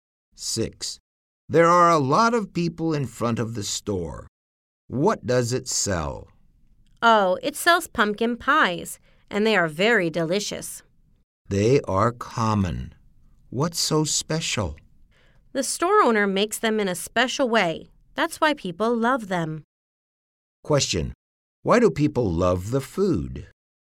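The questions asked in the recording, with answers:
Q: Why do people love the food?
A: The store owner makes the pumpkin pies in a special way.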